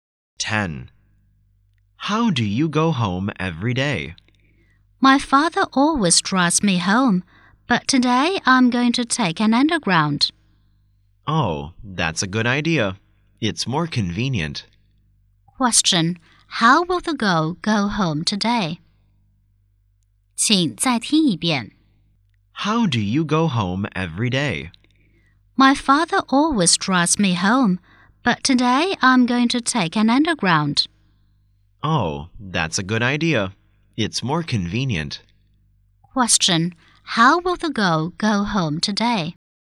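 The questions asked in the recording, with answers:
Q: How will the girl go home today?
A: By underground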